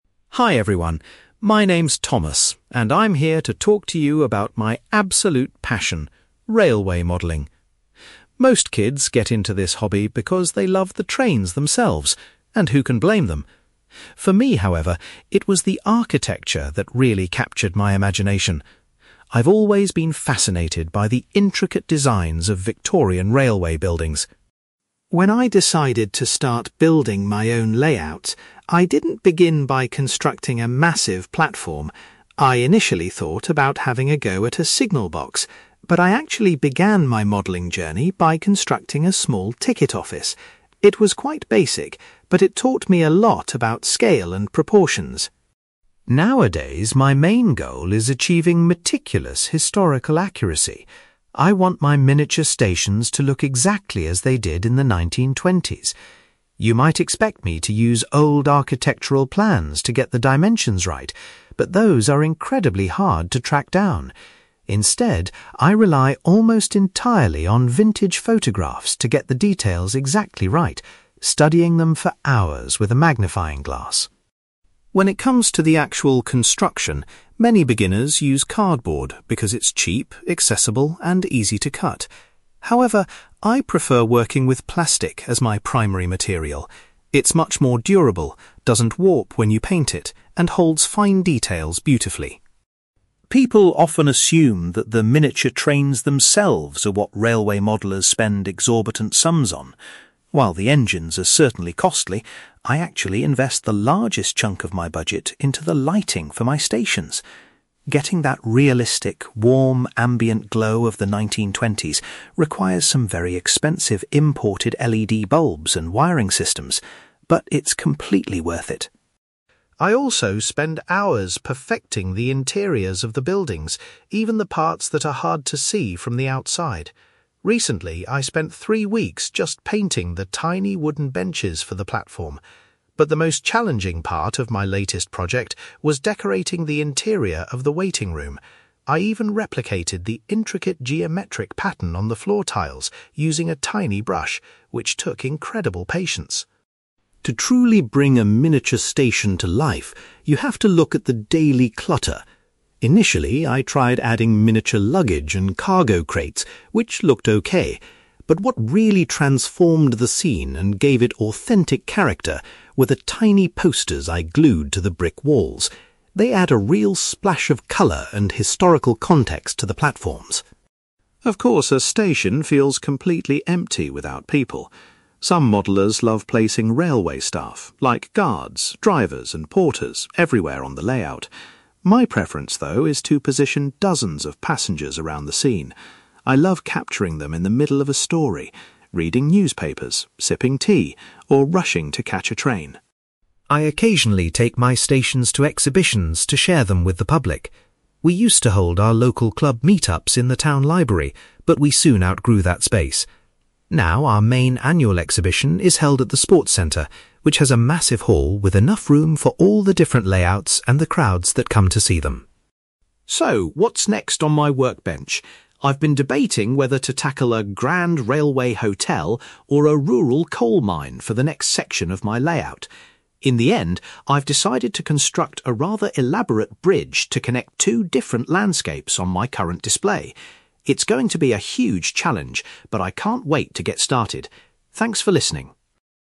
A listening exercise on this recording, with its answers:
You will hear a man called Thomas giving a talk about his hobby of railway modelling. For questions 9-18, complete the sentences with a word or short phrase.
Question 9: Thomas was originally drawn to railway modelling because he was fascinated by the (9)........................... of the buildings.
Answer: architecture

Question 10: The very first model Thomas made was of a (10)........................... .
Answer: ticket office

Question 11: Thomas studies old (11)........................... to ensure his models are historically accurate.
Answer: photographs

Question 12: Thomas prefers using (12)........................... to build his models because it holds fine details.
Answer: plastic

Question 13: Thomas spends the most money on the (13)........................... for his miniature stations.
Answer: lighting

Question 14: Thomas found that decorating the (14)........................... was a particularly difficult task.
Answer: waiting room

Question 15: Adding small (15)........................... to the walls made a big difference to the look of Thomas's station.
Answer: posters

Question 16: Thomas likes to focus on positioning (16)........................... around his model stations.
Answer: passengers

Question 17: Thomas's local modelling club currently holds its annual exhibition in a (17)........................... .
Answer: sports centre

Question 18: Thomas has decided that his next project will be a (18)........................... .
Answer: bridge

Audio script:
Thomas: Hi everyone, my name is Thomas, and I'm here to talk to you about my absolute passion: railway modelling. Most kids get into this hobby because they love the trains themselves, and who can blame them? For me, however, it was the architecture that really captured my imagination. I've always been fascinated by the intricate designs of Victorian railway buildings.
When I decided to start building my own layouts, I didn't begin by constructing a massive platform. I initially thought about having a go at a signal box, but I actually began my modelling journey by constructing a small ticket office. It was quite basic, but it taught me a lot about scale and proportions.
Nowadays, my main goal is achieving meticulous historical accuracy. I want my miniature stations to look exactly as they did in the 1920s. You might expect me to use old architectural plans to get the dimensions right, but those are incredibly hard to track down. Instead, I rely almost entirely on vintage photographs to get the details exactly right, studying them for hours with a magnifying glass.
When it comes to the actual construction, many beginners use cardboard because it's cheap, accessible, and easy to cut. However, I prefer working with plastic as my primary material. It's much more durable, doesn't warp when you paint it, and holds fine details beautifully.
People often assume that the miniature trains themselves are what railway modellers spend exorbitant sums on. While the engines are certainly costly, I actually invest the largest chunk of my budget into the lighting for my stations. Getting that realistic, warm ambient glow of the 1920s requires some very expensive imported LED bulbs and wiring systems, but it's completely worth it.
I also spend hours perfecting the interiors of the buildings, even the parts that are hard to see from the outside. Recently, I spent three weeks just painting the tiny wooden benches for the platform. But the most challenging part of my latest project was decorating the interior of the waiting room. I even replicated the intricate geometric pattern on the floor tiles using a tiny brush, which took incredible patience!
To truly bring a miniature station to life, you have to look at the daily clutter. Initially, I tried adding miniature luggage and cargo crates, which looked okay. But what really transformed the scene and gave it authentic character were the tiny posters I glued to the brick walls. They add a real splash of colour and historical context to the platforms.
Of course, a station feels completely empty without people. Some modellers love placing railway staff, like guards, drivers, and porters, everywhere on the layout. My preference, though, is to position dozens of passengers around the scene. I love capturing them in the middle of a story—reading newspapers, sipping tea, or rushing to catch a train.
I occasionally take my stations to exhibitions to share them with the public. We used to hold our local club meet-ups in the town library, but we soon outgrew that space. Now, our main annual exhibition is held at the sports centre, which has a massive hall with enough room for all the different layouts and the crowds that come to see them.
So, what's next on my workbench? I've been debating whether to tackle a grand railway hotel or a rural coal mine for the next section of my layout. In the end, I've decided to construct a rather elaborate bridge to connect two different landscapes on my current display. It's going to be a huge challenge, but I can't wait to get started. Thanks for listening!

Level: B2